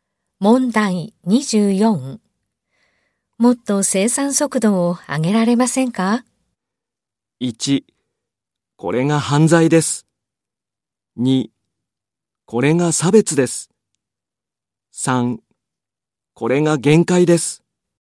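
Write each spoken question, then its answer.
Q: もっと生産速度を上げられませんか?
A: 3: これが限界です。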